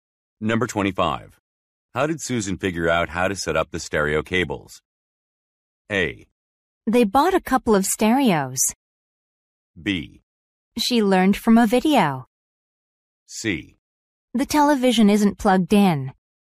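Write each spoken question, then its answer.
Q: How did Susan figure out how to set up the stereo cables?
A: B: She learned from a video.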